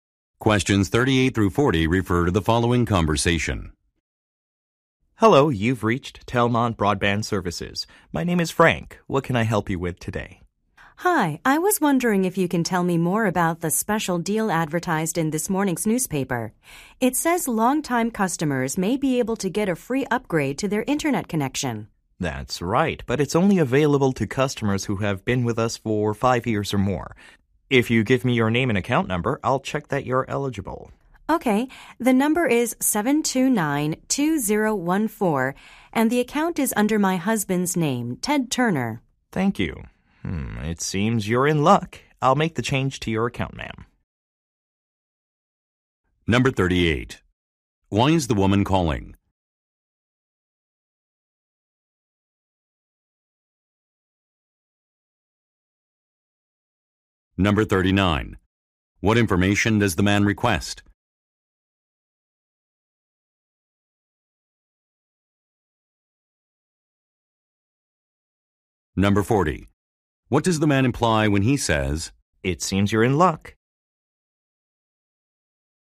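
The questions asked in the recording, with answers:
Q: Why is the woman calling?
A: To ask about a special deal (free internet upgrade)

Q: What information does the man request?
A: Her name and account number

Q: What does the man imply when he says,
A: She is eligible for the free upgrade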